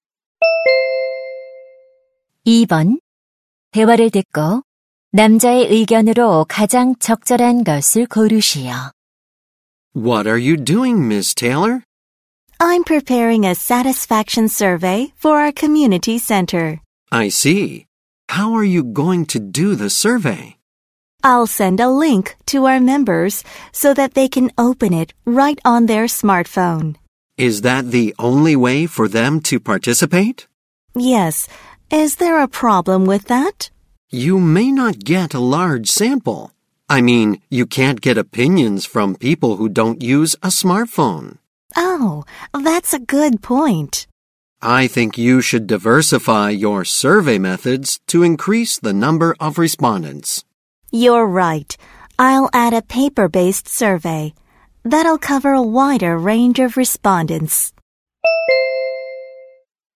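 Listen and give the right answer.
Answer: 응답자 수를 늘리려면 설문 방식을 다양화해야 한다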